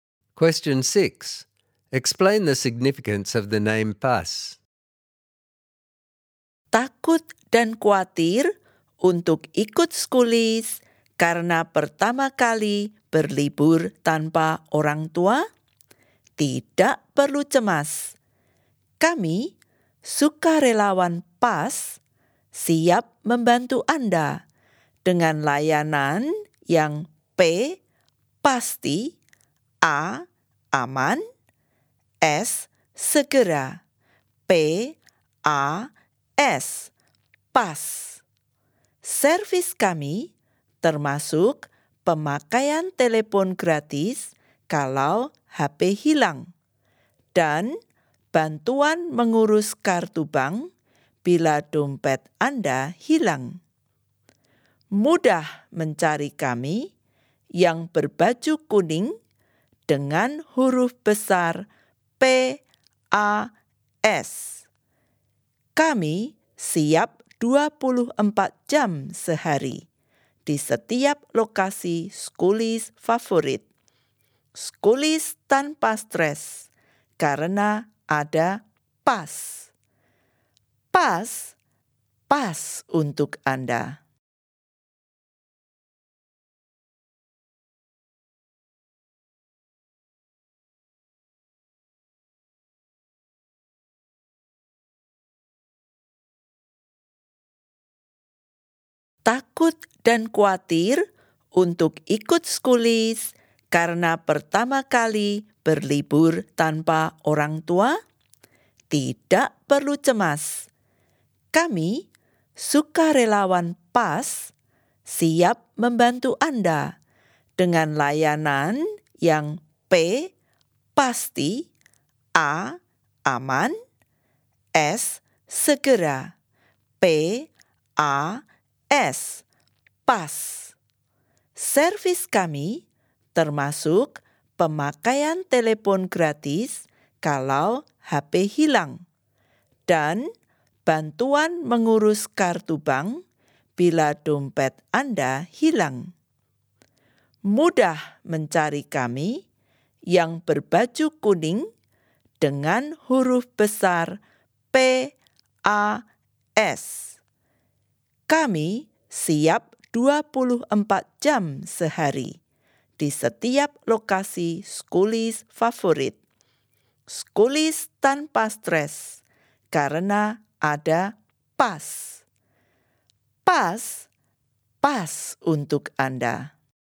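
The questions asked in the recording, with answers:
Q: Explain the significance of the name pas.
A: PAS stands for pasti, aman, segera (reliable, safe, quick), and 'pas' also means 'just right' for you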